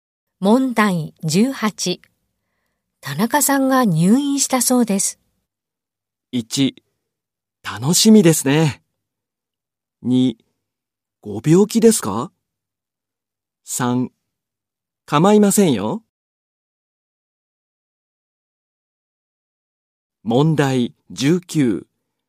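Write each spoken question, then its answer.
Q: 田中さんが入院したそうです。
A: 2: ご病気ですか?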